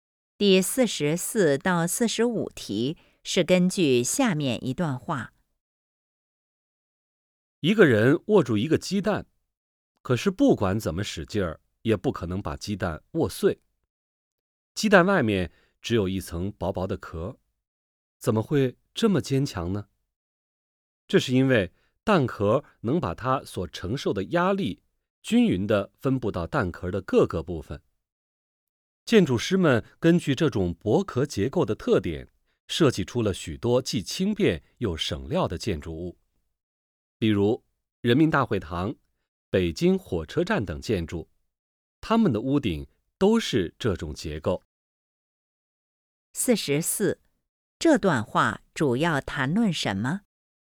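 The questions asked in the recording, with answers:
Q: 这段话主要谈论什么?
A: 蛋壳的薄壳结构

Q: 根据这段话,建筑的哪个部分最常用到这种结构?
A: 屋顶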